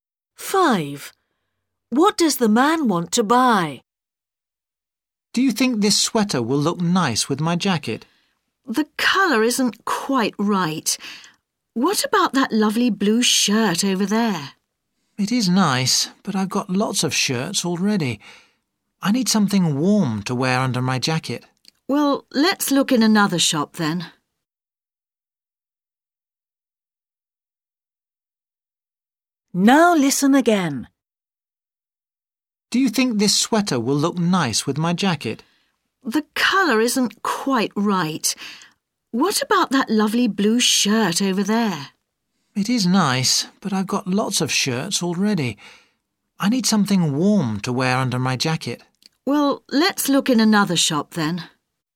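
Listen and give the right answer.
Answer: a sweater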